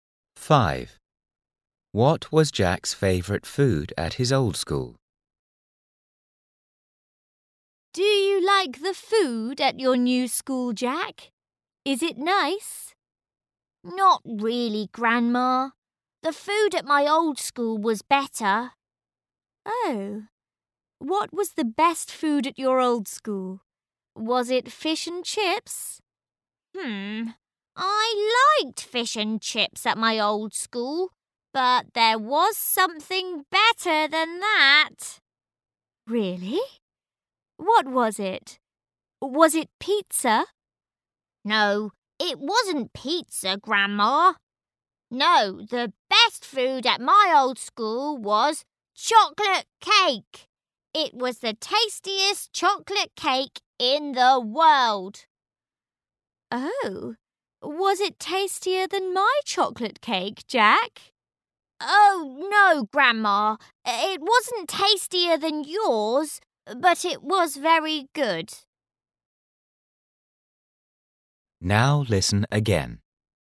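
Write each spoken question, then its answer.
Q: What was Jack's favourite food at his old school?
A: Chocolate cake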